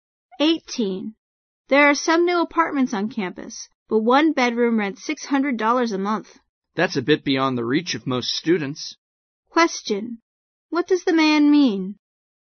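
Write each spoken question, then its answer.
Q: What does the man mean?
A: Most students can't afford the apartments.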